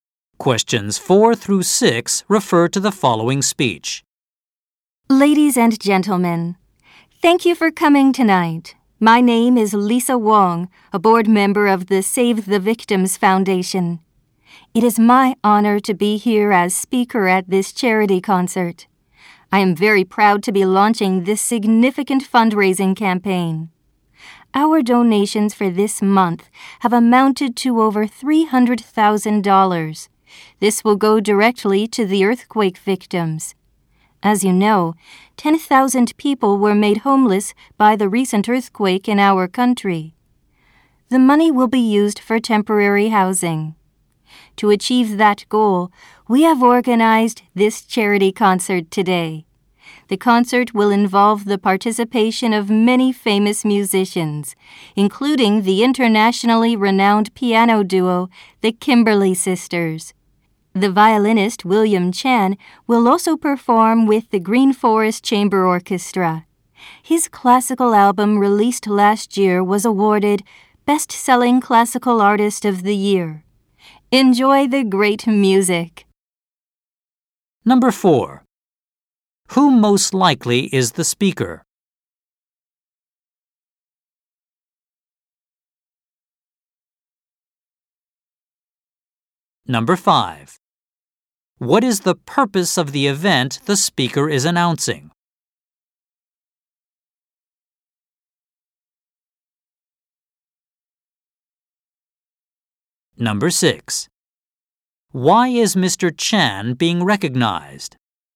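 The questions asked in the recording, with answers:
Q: Who most likely is the speaker?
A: A board member of a charity foundation

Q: What is the purpose of the event the speaker is announcing?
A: To raise money for earthquake victims

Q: Why is Mr. Chan being recognized?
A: His classical album won Best-Selling Classical Artist of the Year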